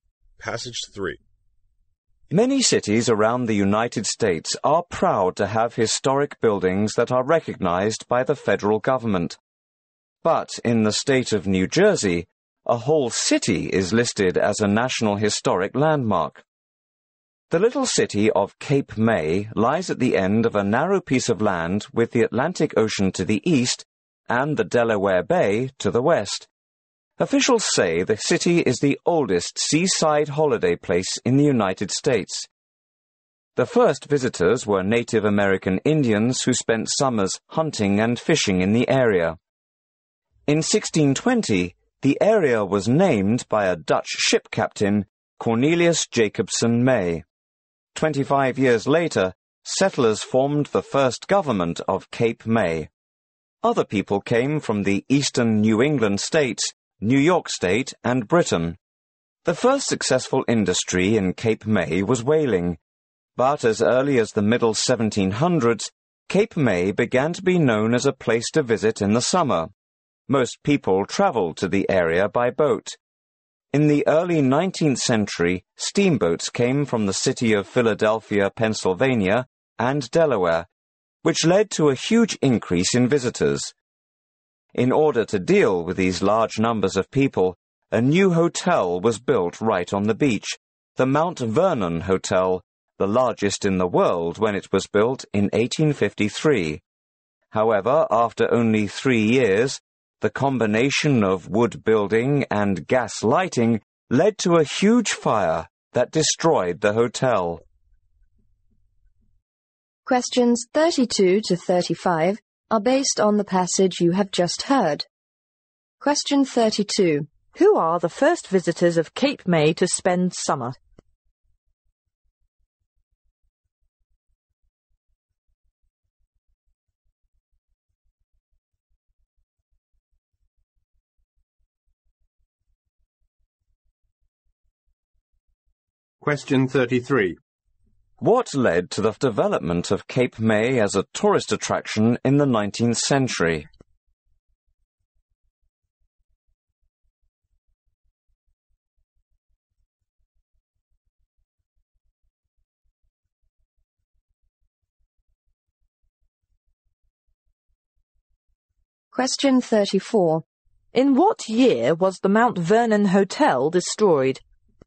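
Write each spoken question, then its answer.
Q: Who are the first visitors of Cape May to spend summer?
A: Native American Indians

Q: What led to the development of Cape May as a tourist attraction in the 19th century?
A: Steamboats from Philadelphia and Delaware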